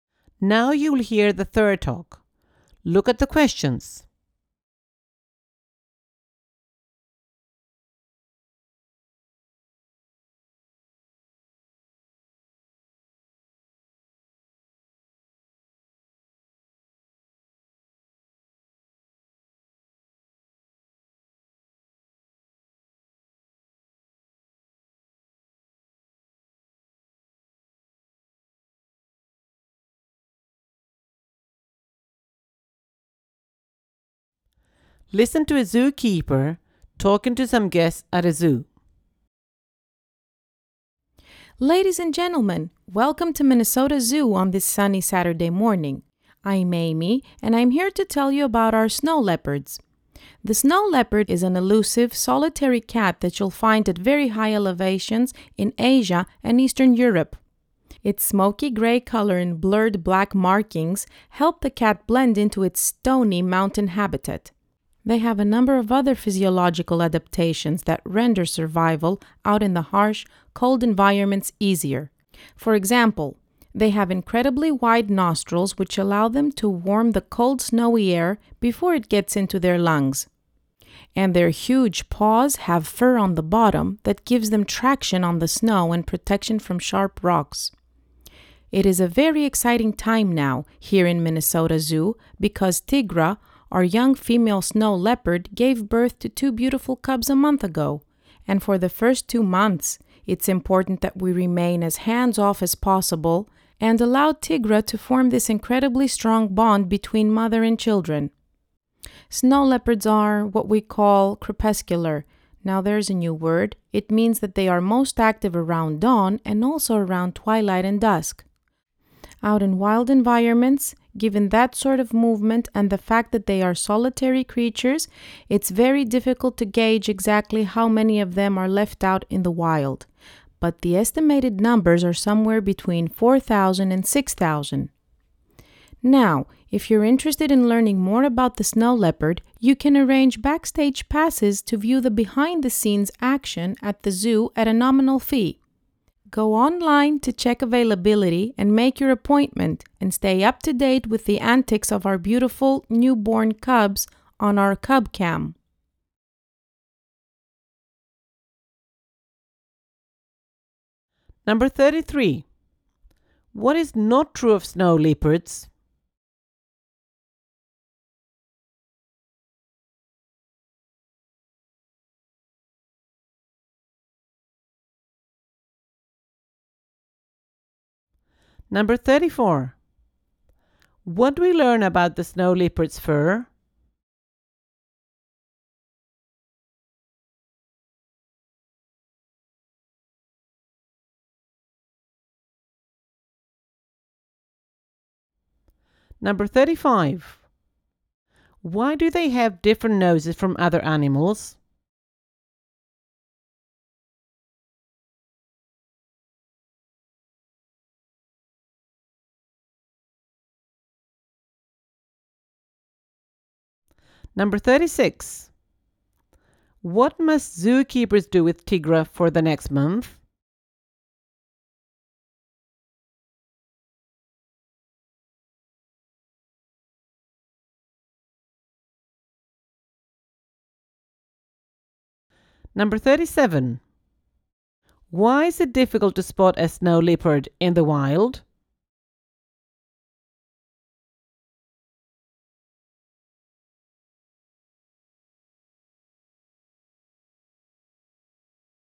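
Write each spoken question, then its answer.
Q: Why do they have different noses from other animals?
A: Their wide nostrils warm the cold air before it reaches their lungs

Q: What must zookeepers do with Tigra for the next month?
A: Stay as hands-off as possible so she can bond with her cubs

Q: What must people do to get a backstage pass for the snow leopard?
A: Go online, check availability, book an appointment and pay a small fee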